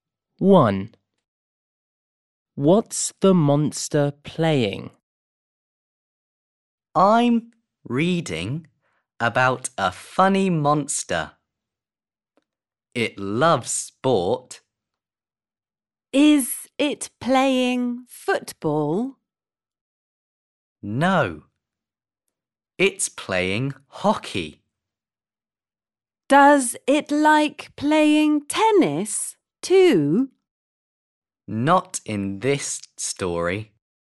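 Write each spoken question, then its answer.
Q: What's the monster playing?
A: hockey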